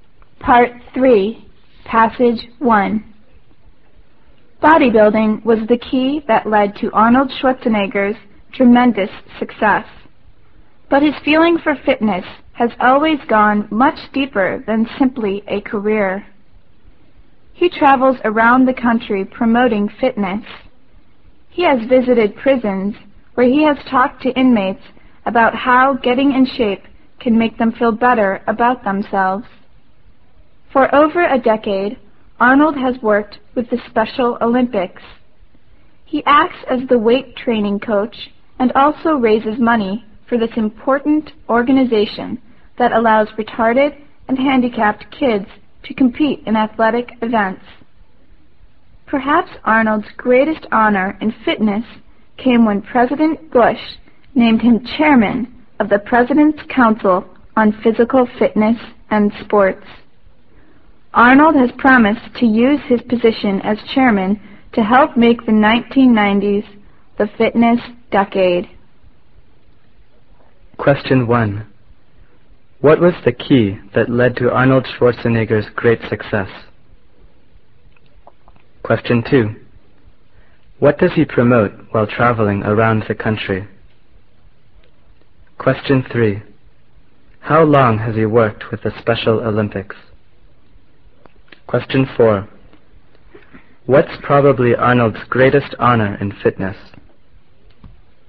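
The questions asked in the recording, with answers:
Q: What was the key that led to Arnold Schwarzenegger's great success?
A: Bodybuilding

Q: What does he promote while traveling around the country?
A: Fitness

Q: How long has he worked with the Special Olympics?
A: For over a decade

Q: What's probably Arnold's greatest honor in fitness?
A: Being named chairman of the President's Council on Physical Fitness and Sports by President Bush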